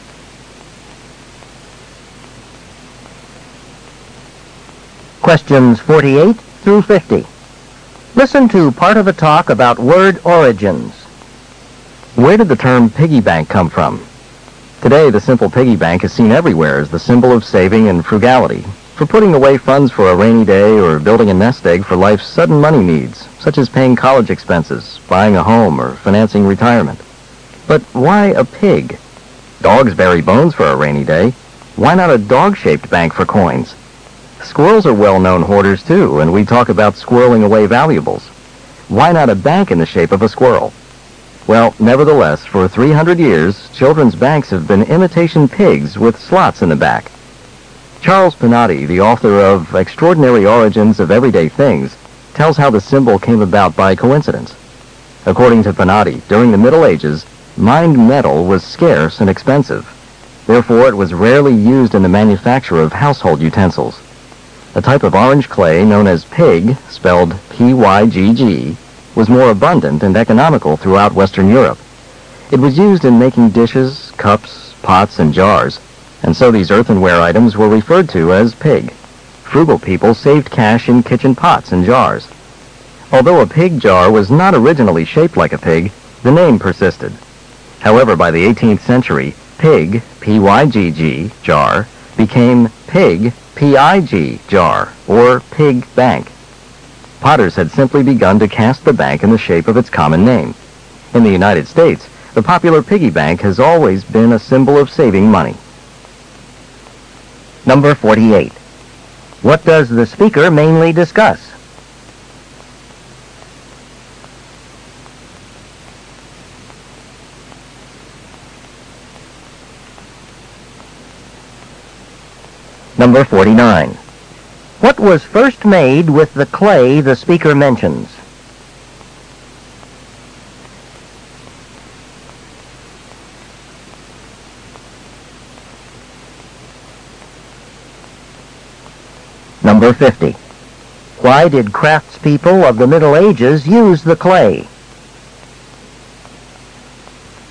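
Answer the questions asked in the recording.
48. The origin of the term piggy bank
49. Dishes, cups, pots, and jars
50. It was more abundant and cheaper than metal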